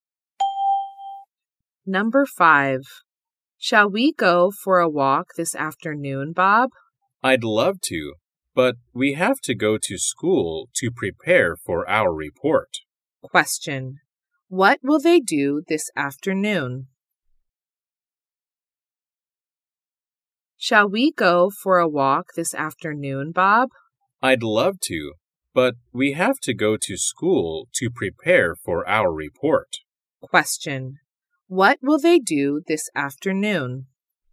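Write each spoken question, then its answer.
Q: What will they do this afternoon?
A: Go to school to prepare for their report.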